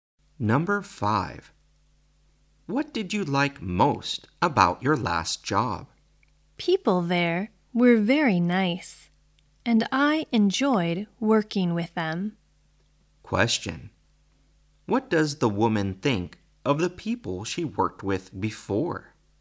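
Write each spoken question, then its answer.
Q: What does the woman think of the people she worked with before?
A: They were very nice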